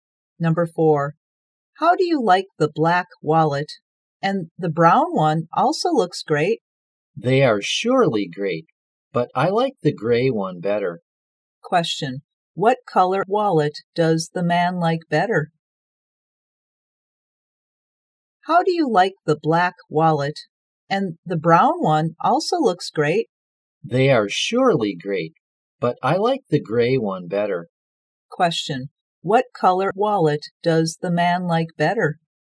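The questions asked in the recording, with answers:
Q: what color wallet does the man like better?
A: Gray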